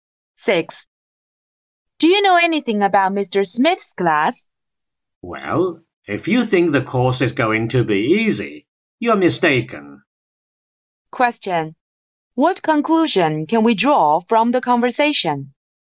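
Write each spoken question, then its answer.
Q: What conclusion can we draw from the conversation?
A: Mr. Smith's course is not easy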